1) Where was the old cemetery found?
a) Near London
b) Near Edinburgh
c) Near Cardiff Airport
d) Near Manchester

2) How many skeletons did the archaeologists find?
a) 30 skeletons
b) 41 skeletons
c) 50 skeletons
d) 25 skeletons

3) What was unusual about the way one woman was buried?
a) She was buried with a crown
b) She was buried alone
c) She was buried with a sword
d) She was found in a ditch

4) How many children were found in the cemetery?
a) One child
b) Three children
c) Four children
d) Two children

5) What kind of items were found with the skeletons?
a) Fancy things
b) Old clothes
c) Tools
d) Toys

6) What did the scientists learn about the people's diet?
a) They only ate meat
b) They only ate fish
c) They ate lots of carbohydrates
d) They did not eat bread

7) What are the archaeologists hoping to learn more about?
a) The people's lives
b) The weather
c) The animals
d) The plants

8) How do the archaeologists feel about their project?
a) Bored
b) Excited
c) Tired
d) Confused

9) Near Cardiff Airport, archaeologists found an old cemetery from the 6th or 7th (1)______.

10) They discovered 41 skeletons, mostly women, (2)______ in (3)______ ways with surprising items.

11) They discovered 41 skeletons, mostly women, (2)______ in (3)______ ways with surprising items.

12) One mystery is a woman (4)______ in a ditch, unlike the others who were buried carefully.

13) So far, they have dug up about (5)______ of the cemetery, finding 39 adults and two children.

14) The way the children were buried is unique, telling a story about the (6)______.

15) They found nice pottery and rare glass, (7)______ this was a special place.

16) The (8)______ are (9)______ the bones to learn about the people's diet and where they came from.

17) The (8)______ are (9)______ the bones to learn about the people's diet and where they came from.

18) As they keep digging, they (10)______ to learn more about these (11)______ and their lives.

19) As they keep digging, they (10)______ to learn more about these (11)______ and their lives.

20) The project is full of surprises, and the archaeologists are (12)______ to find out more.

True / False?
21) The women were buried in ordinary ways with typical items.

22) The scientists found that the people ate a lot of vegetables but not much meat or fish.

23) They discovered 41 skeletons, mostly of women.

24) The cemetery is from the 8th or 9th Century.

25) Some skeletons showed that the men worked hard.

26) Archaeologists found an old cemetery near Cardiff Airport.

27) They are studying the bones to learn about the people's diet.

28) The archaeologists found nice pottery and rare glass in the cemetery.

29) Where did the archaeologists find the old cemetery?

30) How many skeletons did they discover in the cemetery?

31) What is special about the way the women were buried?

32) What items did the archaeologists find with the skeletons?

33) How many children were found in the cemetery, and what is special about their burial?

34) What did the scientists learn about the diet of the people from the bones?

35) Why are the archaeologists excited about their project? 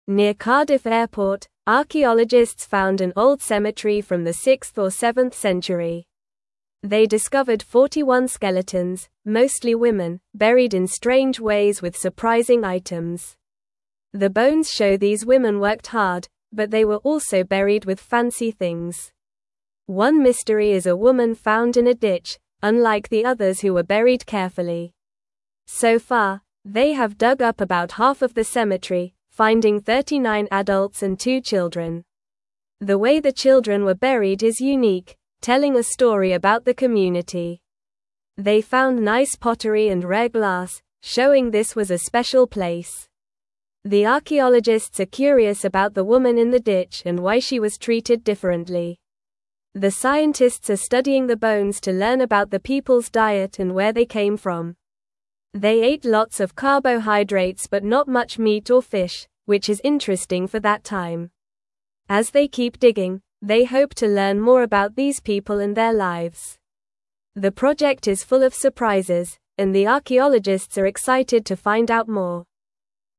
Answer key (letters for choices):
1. c
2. b
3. d
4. d
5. a
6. c
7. a
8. b
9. Century
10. buried
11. strange
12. found
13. half
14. community
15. showing
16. scientists
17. studying
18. hope
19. people
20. excited
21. False
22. False
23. True
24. False
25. False
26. True
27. True
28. True
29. Near Cardiff Airport.
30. They discovered 41 skeletons.
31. The women were buried in strange ways with surprising items.
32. They found nice pottery and rare glass.
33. Two children were found, and their burial is unique and tells a story about the community.
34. They learned that the people ate lots of carbohydrates but not much meat or fish.
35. They are excited because they keep finding surprises and want to learn more about the people and their lives.

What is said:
Near Cardiff Airport, archaeologists found an old cemetery from the 6th or 7th Century. They discovered 41 skeletons, mostly women, buried in strange ways with surprising items. The bones show these women worked hard, but they were also buried with fancy things. One mystery is a woman found in a ditch, unlike the others who were buried carefully.
So far, they have dug up about half of the cemetery, finding 39 adults and two children. The way the children were buried is unique, telling a story about the community. They found nice pottery and rare glass, showing this was a special place. The archaeologists are curious about the woman in the ditch and why she was treated differently.
The scientists are studying the bones to learn about the people's diet and where they came from. They ate lots of carbohydrates but not much meat or fish, which is interesting for that time. As they keep digging, they hope to learn more about these people and their lives. The project is full of surprises, and the archaeologists are excited to find out more.

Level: Level 2